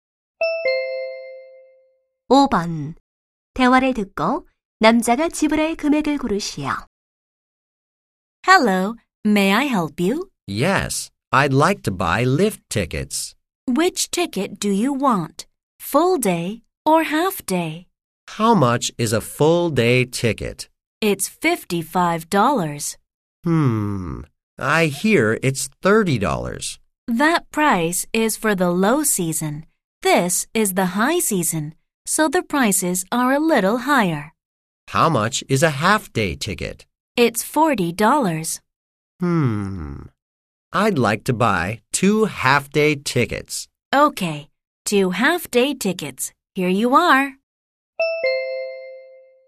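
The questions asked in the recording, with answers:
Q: 대화를 듣고 남자가 지불할 금액을 고르시오.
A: $80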